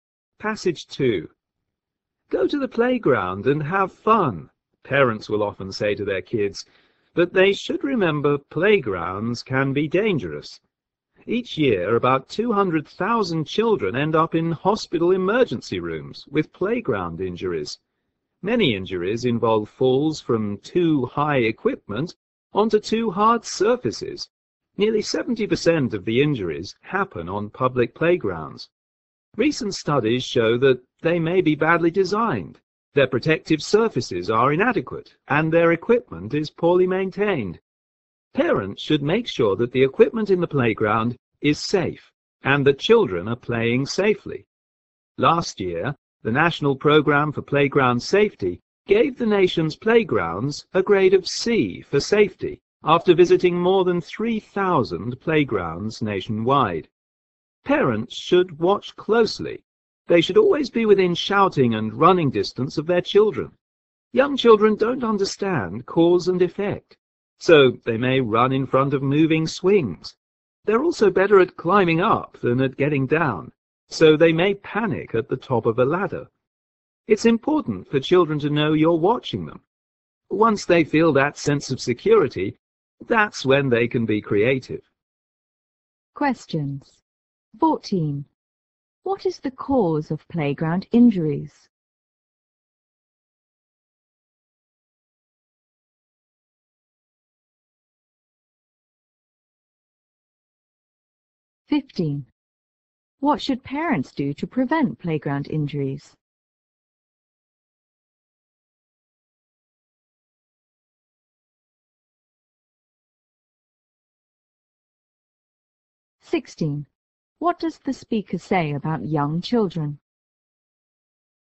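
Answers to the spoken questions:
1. Badly designed, poorly maintained playgrounds with inadequate protective surfaces.
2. Watch their children closely and stay within shouting and running distance.
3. They don't understand cause and effect.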